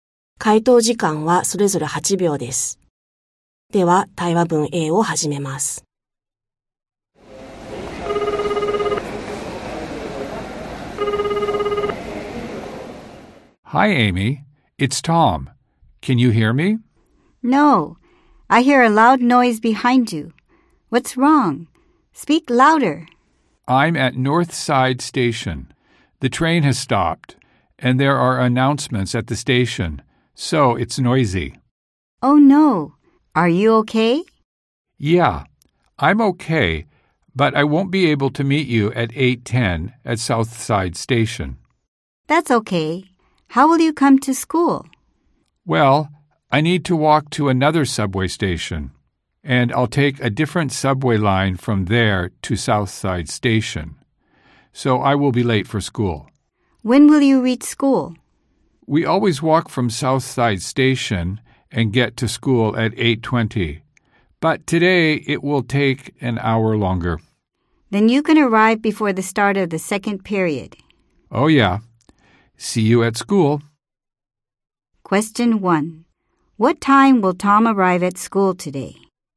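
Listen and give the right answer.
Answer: 9:20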